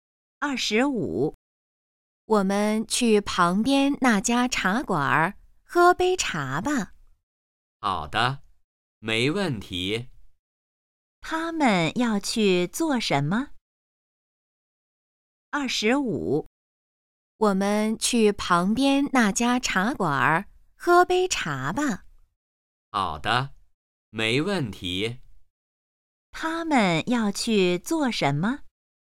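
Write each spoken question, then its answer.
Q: 他们要去做什么?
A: 去茶馆喝茶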